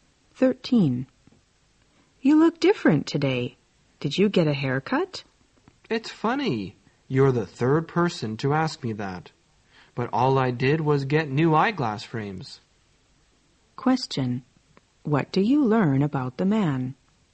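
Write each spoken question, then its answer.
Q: What do you learn about the man?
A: He got new eyeglass frames, not a haircut.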